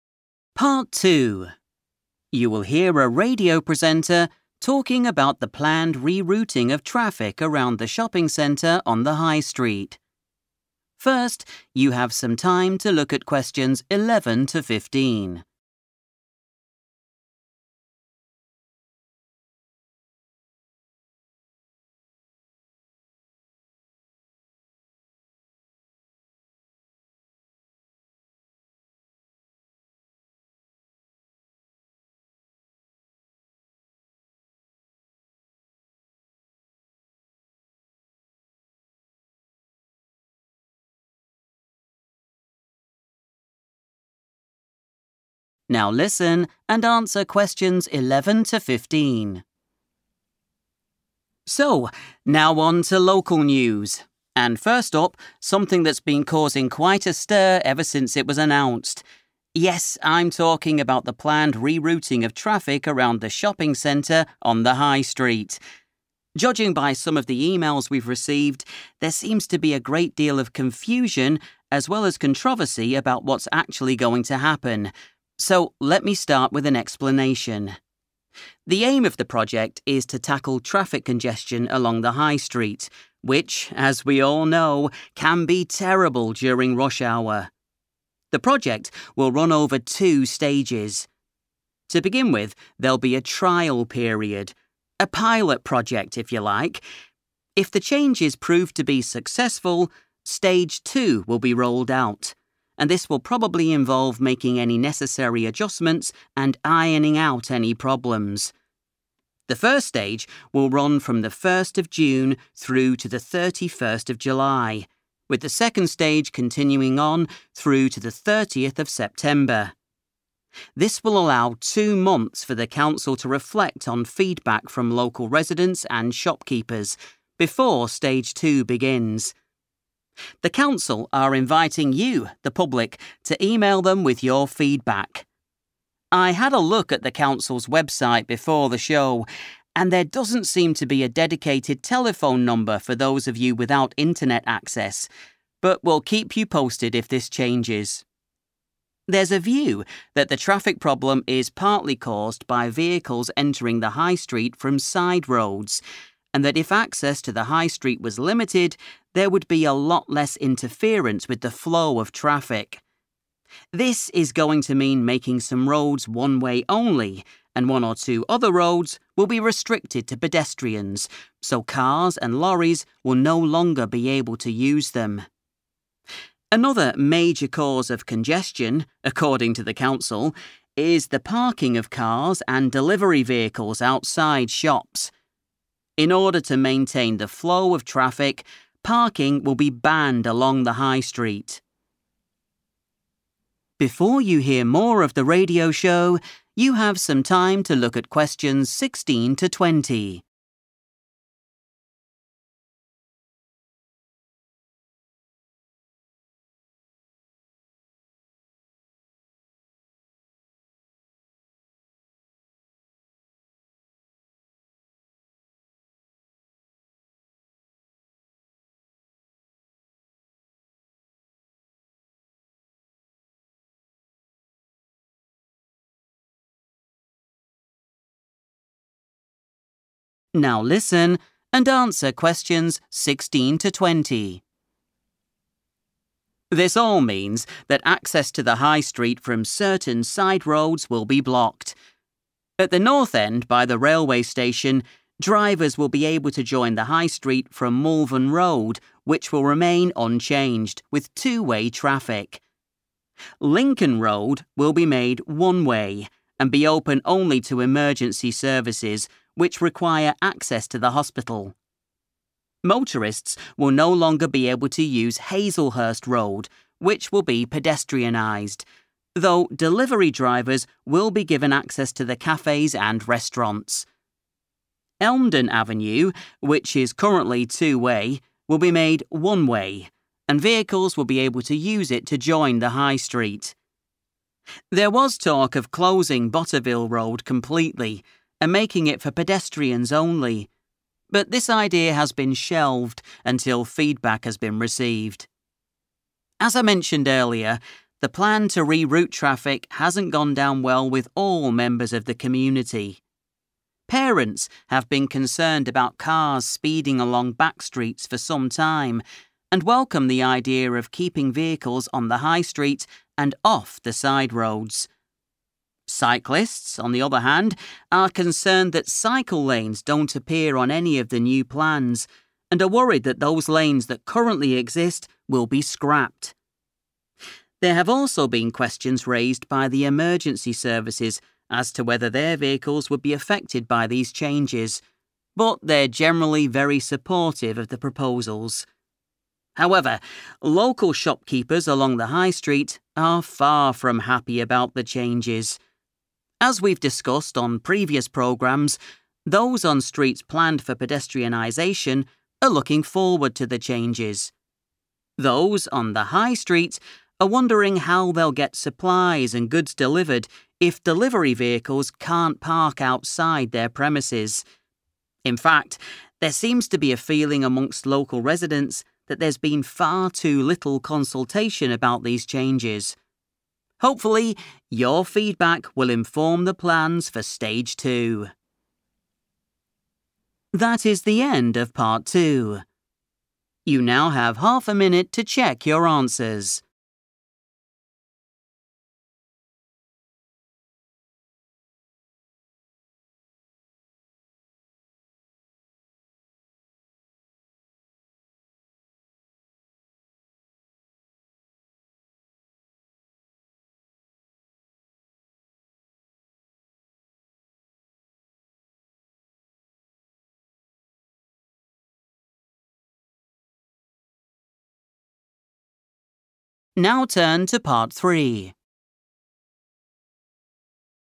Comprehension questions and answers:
Complete the notes below. Write NO MORE THAN TWO WORDS AND/OR A NUMBER for each answer.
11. The re-routing plans are an attempt to reduce traffic during 11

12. Stage 1 will commence on 12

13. Please send us your views of the project by 13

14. In order to keep traffic moving, access to the High Street will be 14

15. will not be allowed on the High Street.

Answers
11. rush hour
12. 1st June / 1 June / June 1st / June 1 / 1st of June
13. email
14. limited
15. Parking

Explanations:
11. The transcript says the project wants to fix the problem of stuck traffic on the High Street, which is very bad during the busiest travel times of the day. Answer Explanation: The answer refers to the busy time of day when many people are traveling to or from work, which causes a lot of traffic. Reason For Correctness: The correct answer is rush hour because the transcript states that the goal (aim) of the project is to solve (tackle) the problem of having too many cars (traffic congestion) during that specific busy time.
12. The transcript says that the first part of the project starts on June 1st and lasts until July 31st. Answer Explanation: The answer is the date when the first part of the traffic project begins. Reason For Correctness: The correct answer is 1st June because the presenter mentions that the first part (Stage 1) of the project is scheduled to begin on this specific day. The word 'commence' used in the question is a synonym for 'run from' or 'start'.
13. The transcript explains that the council (the local government) wants people to send their opinions (feedback) to them using email. Answer Explanation: The answer 'email' indicates that people should use electronic messages to tell the council what they think about the new traffic plans. Reason For Correctness: The correct answer is 'email' because the local council is looking for public feedback and is specifically asking people to send that information through email. They also mention that there is no phone number to call, so email is the primary way to share 'views' or opinions.
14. The transcript explains that some people believe traffic jams happen because cars come onto the High Street from smaller side roads. To help traffic move better, they want to limit or restrict how many cars can enter the High Street. Answer Explanation: The answer 'limited' means that there will be rules to stop or reduce the number of vehicles entering the main road. Reason For Correctness: The correct answer is 'limited' because the speaker explains that reducing the amount of traffic entering from side roads will make the traffic flow more smoothly. In the transcript, the speaker mentions that if the entry to the High Street was restricted or reduced (limited), there would be fewer interruptions for the cars already driving on it. This matches the note about keeping traffic moving.
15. The transcript says that to keep traffic moving without stopping, the act of leaving cars (parking) will be stopped or forbidden on the main road. Answer Explanation: The answer 'Parking' refers to the act of stopping a vehicle and leaving it in a spot for a period of time. Reason For Correctness: The correct answer is 'Parking' because the speaker explains that vehicles stopping on the road causes traffic jams (congestion). To help the traffic move smoothly (maintain the flow), the council decided that leaving vehicles on the road will be 'banned,' which is a synonym for 'not allowed.'

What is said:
Presenter: So, now on to local news, and first up, something that's been causing quite a stir ever since it was announced. Judging by some of the emails we've received, there seems to be a great deal of confusion as well as controversy about what's actually going to happen so let me start with an explanation.
The aim of the project is to tackle traffic congestion along the High Street, which, as we all know, can be terrible during rush hour. The project will run over two stages. To begin with, there'll be a trial period, a pilot project, if you like. If the changes prove to be successful, stage two will be rolled out, and this will probably involve making any necessary adjustments and ironing out any problems. The first stage will run from the 1st of June through to the 31st of July, with the second stage continuing on through to the 30th of September. This will allow two months for the council to reflect on feedback from local residents and shopkeepers before stage two begins. The council are inviting you the public to email them with your feedback. I had a look at the council's website before the show and there doesn't seem to be a dedicated telephone number for those of you without internet access, but we'll keep you posted if this changes.
There's a view that the traffic problem is partly caused by vehicles entering the High Street from side roads and that if access to the High Street was limited, there would be a lot less interference with the flow of traffic. This is going to mean making some roads one-way only, and one or two other roads will be restricted to pedestrians so cars and lorries will no longer be able to use them. Another major cause of congestion, according to the council, is the parking of cars and delivery vehicles outside shops. In order to maintain the flow of traffic, parking will be banned along the High Street.
This all means that access to the High Street from certain side roads will be blocked. At the north end by the railway station, drivers will be able to join the High Street from Malvern Road, which will remain unchanged, with two-way traffic. Lincoln Road will be made one-way and be open only to emergency services, which require access to the hospital. Motorists will no longer be able to use Hazelhurst Road, which will be pedestrianised, though delivery drivers will be given access to the cafes and restaurants. Elmdon Avenue, which is currently two-way, will be made one-way, and vehicles will be able to use it to join the High Street. There was talk of closing Botteville Road completely and making it for pedestrians only but this idea has been shelved until feedback has been received.
As I mentioned earlier, the plan to re-route traffic hasn't gone down well with all members of the community. Parents have been concerned about cars speeding along back streets for some time and welcome the idea of keeping vehicles on the High Street and off the side roads. Cyclists, on the other hand, are concerned that cycle lanes don't appear on any of the new plans and are worried that those lanes that currently exist will be scrapped. There have also been questions raised by the emergency services as to whether their vehicles would be affected by these changes but they're generally very supportive of the proposals. However, local shopkeepers along the High Street are far from happy about the changes. As we've discussed on previous programmes, those on streets planned for pedestrianisation are looking forward to the changes. Those on the High Street are wondering how they'll get supplies and goods delivered if delivery vehicles can't park outside their premises. In fact, there seems to be a feeling amongst local residents that there's been far too little consultation about these changes. Hopefully, your feedback will inform the plans for stage two.